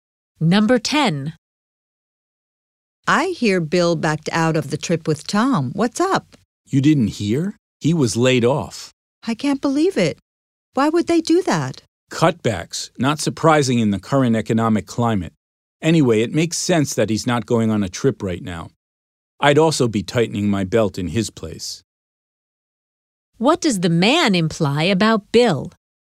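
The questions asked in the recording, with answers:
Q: What does the man imply about Bill?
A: He needs to save money since he lost his job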